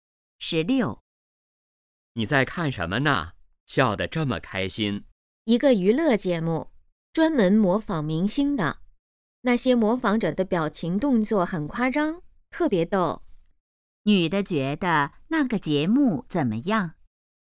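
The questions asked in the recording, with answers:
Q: 女的觉得那个节目怎么样?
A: 很逗,很好笑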